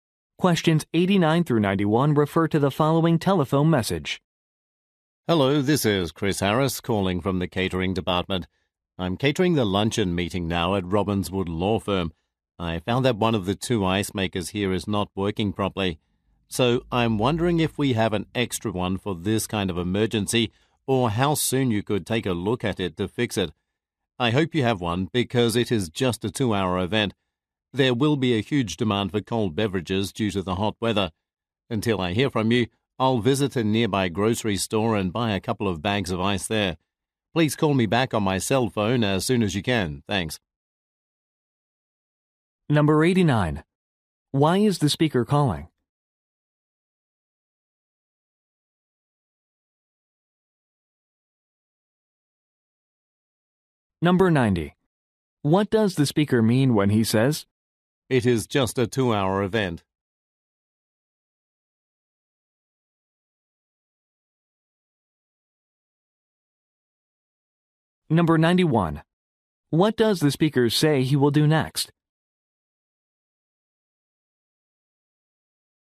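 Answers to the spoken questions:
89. To report a broken ice maker
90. A replacement or repair is needed very soon
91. Buy ice at a nearby grocery store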